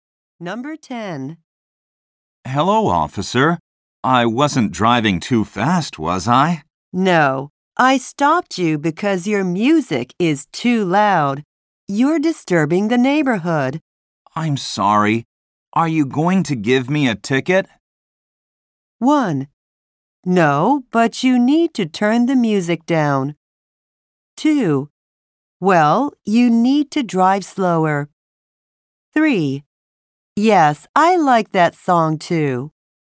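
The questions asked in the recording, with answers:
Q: I'm sorry. Are you going to give me a ticket?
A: 1: No, but you need to turn the music down.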